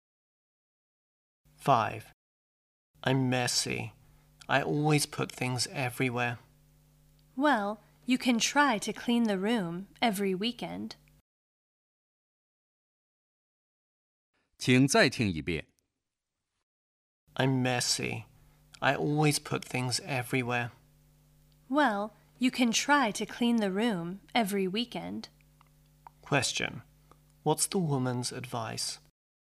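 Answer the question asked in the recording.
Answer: Clean the room every weekend.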